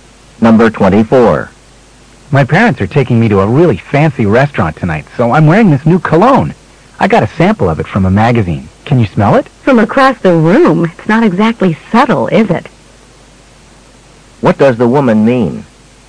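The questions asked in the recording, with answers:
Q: What does the woman mean?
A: The cologne is too strong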